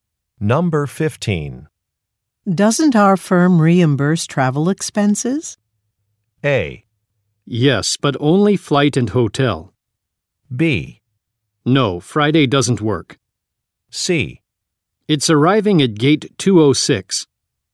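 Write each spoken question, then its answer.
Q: Doesn't our firm reimburse travel expenses?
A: A: Yes, but only flight and hotel.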